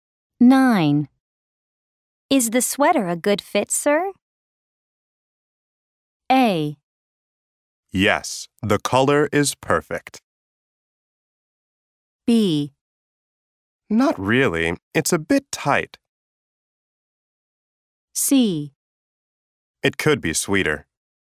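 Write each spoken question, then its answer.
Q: Is the sweater a good fit, sir?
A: B: Not really, it's a bit tight.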